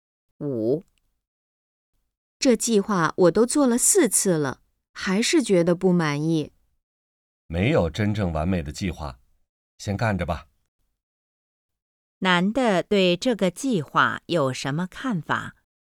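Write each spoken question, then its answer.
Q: 男的对这个计划有什么看法?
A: 没有完美的计划,先干着再说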